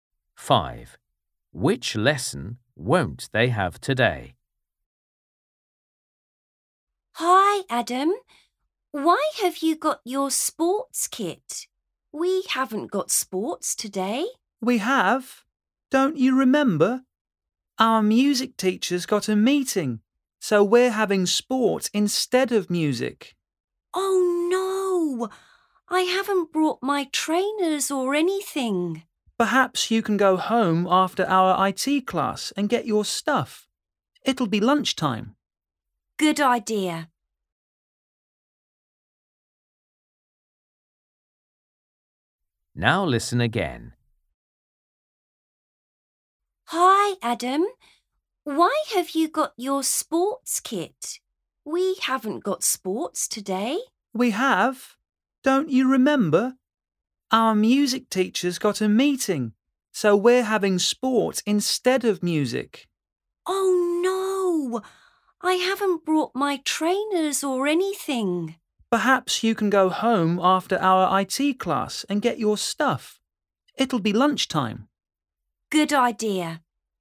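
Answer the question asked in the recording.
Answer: music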